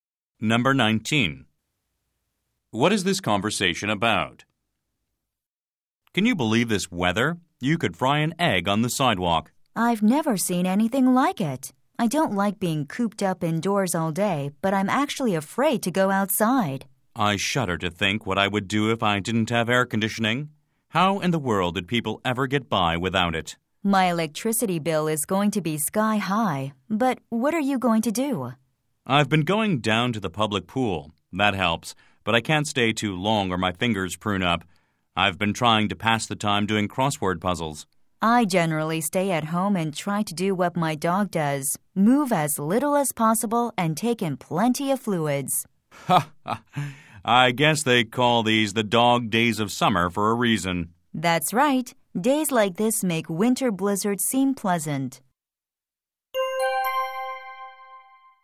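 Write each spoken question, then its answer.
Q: What is this conversation about?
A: The extremely hot summer weather and how they cope with it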